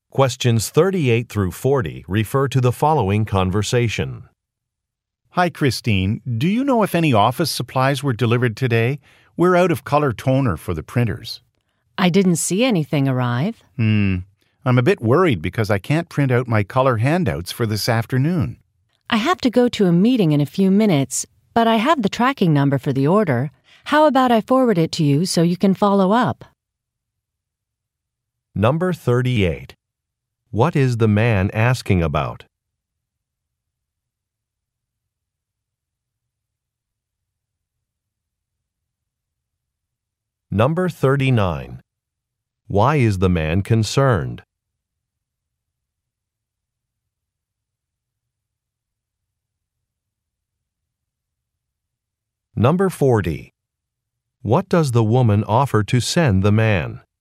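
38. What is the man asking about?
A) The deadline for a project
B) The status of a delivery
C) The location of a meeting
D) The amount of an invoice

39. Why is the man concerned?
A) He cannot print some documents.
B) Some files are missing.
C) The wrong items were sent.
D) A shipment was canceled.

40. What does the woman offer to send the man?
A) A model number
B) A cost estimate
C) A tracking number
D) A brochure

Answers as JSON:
{"38": "B", "39": "A", "40": "C"}

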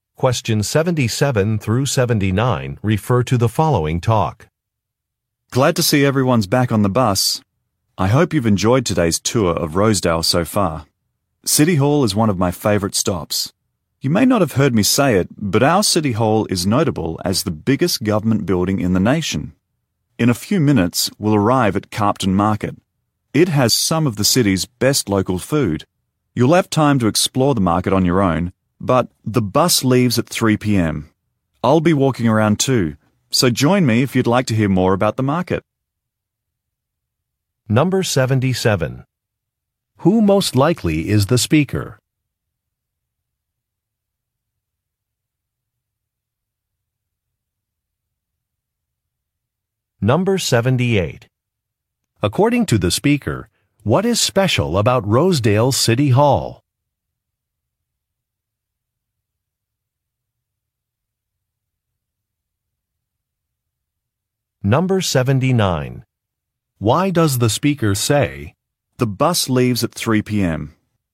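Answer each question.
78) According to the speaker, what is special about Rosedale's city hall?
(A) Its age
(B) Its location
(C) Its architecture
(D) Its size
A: D

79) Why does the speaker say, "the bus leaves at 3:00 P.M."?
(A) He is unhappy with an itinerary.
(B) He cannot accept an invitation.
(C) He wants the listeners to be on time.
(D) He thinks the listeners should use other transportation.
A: C

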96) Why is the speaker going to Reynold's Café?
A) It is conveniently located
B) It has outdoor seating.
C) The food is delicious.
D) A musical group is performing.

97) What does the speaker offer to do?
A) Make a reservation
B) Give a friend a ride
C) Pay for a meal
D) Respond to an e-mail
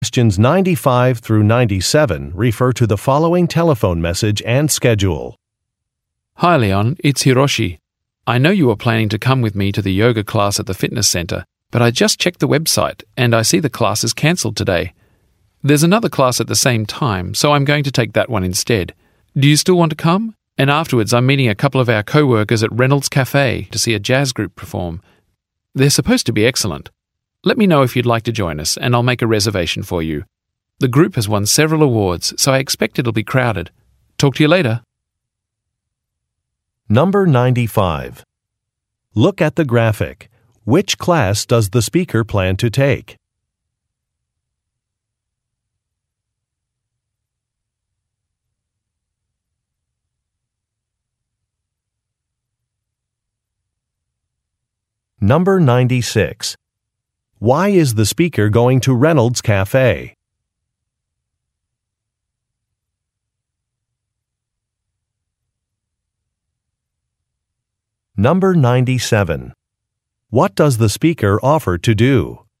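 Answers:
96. D
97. A

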